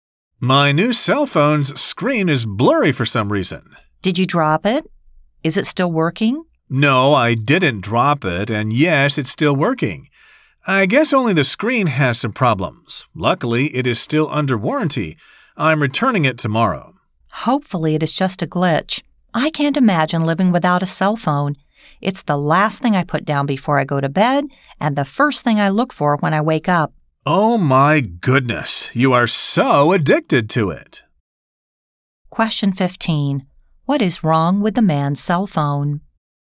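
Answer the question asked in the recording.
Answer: Its screen is blurry.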